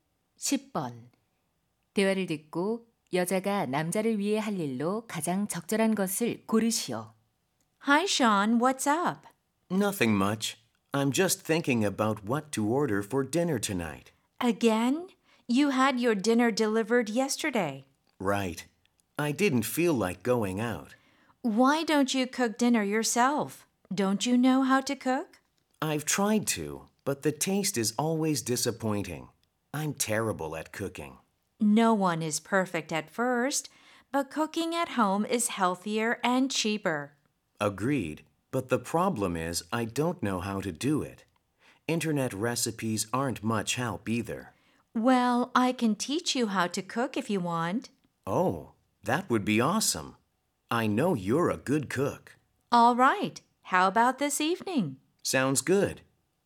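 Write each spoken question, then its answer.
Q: 대화를 듣고 여자가 남자를 위해 할 일로 가장 적절한 것을 고르시오.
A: 요리하는 법 가르쳐 주기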